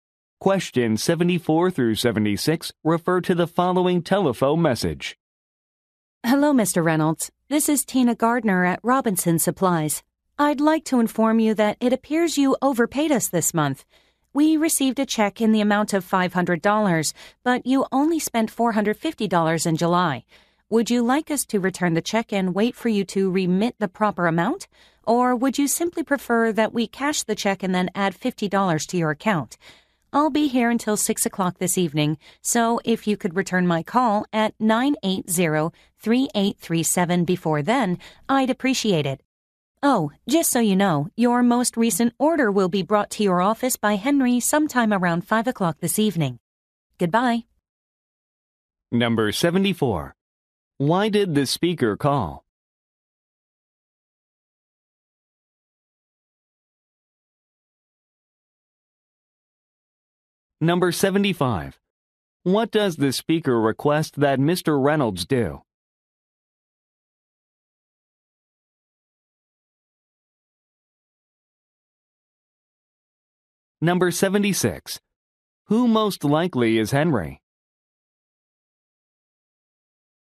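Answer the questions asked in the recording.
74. Mr. Reynolds overpaid this month
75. Return her call before 6 o'clock
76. A delivery person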